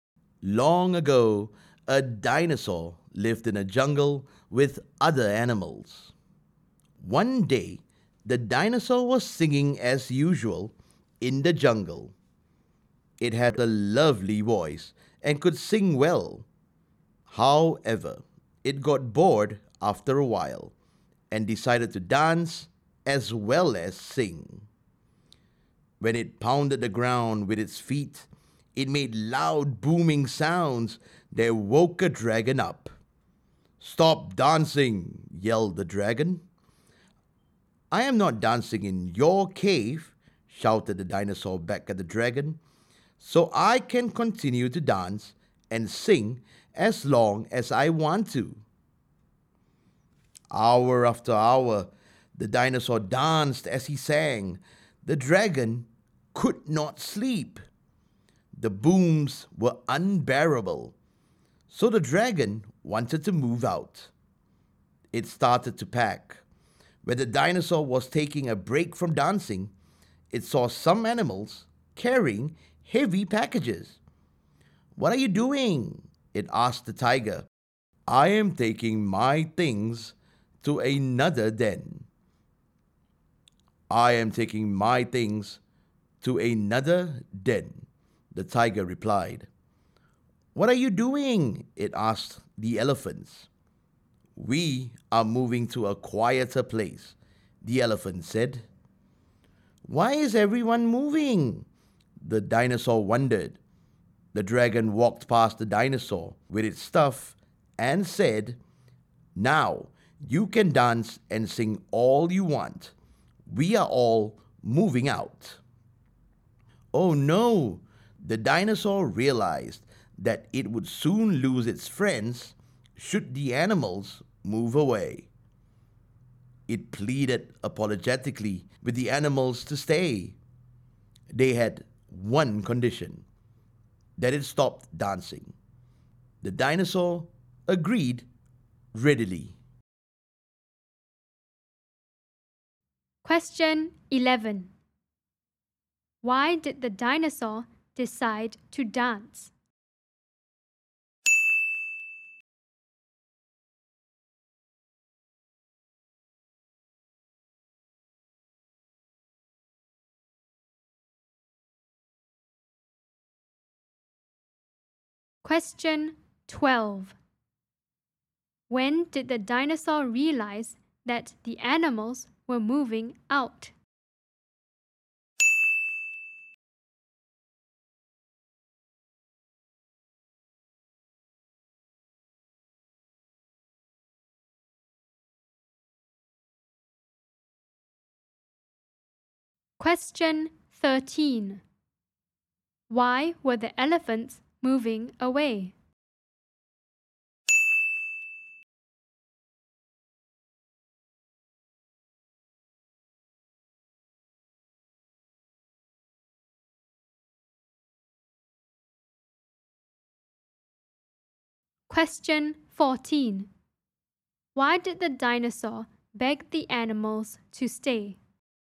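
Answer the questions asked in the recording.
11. It got bored of just singing
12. When it was taking a break from dancing and saw animals carrying heavy packages
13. They wanted a quieter place
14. It did not want to lose its friends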